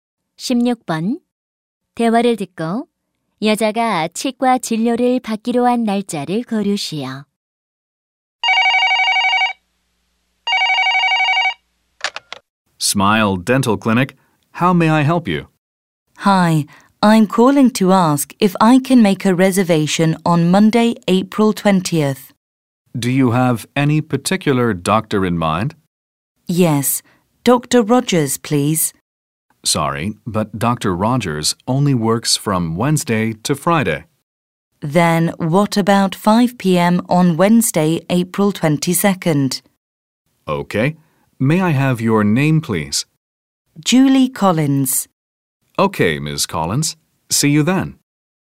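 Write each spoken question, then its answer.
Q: 대화를 듣고 여자가 치과 진료를 받기로 한 날짜를 고르시오.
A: 4월 22일 (수요일)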